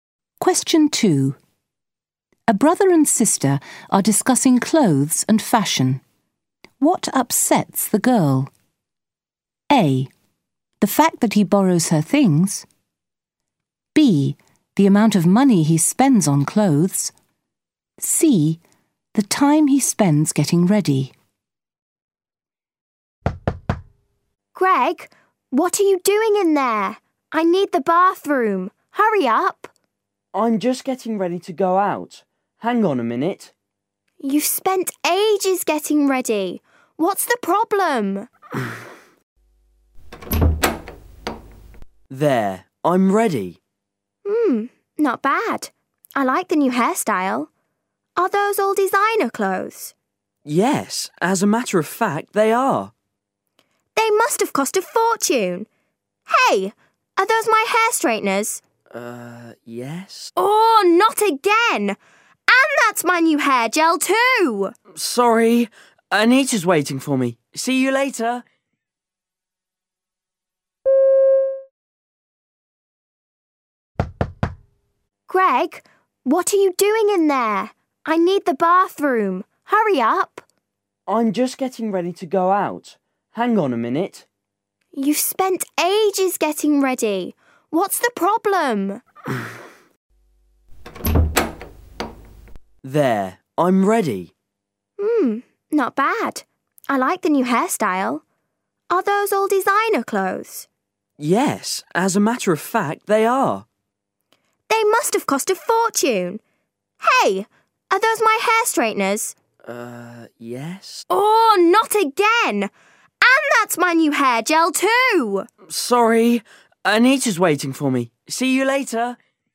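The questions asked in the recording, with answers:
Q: What upsets the girl?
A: A: The fact that he borrows her things.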